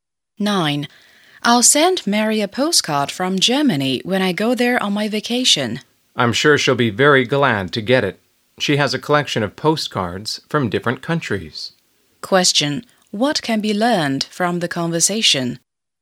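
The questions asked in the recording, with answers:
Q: What can be learned from the conversation?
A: Mary collects postcards from different countries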